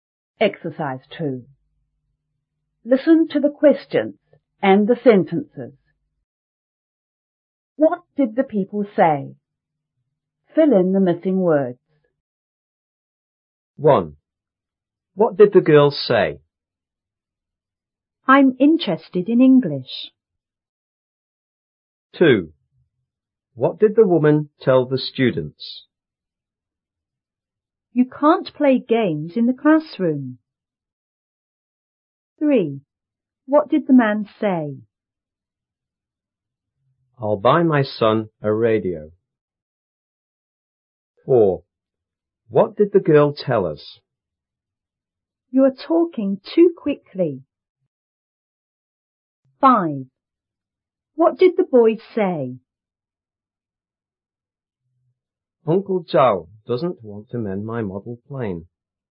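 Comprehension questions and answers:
What did the people say?Fill in the missing words.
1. She said (that) _ _ intereested in English.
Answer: she was

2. She told the students (that) _ _ play games in the classroom.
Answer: they couldn't

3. He said (that) _ _ buy _ son a radio.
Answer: he would; his

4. She told us (that) _ _ talking too quickly.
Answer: we were

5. He said (that) Uncle Zhao _ want to mend _ model plane.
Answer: didn't; his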